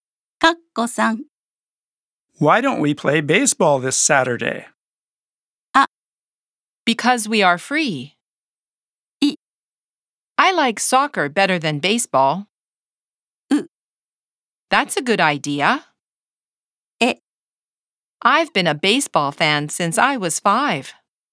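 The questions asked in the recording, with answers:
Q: Why don't we play baseball this Saturday?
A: う: That's a good idea.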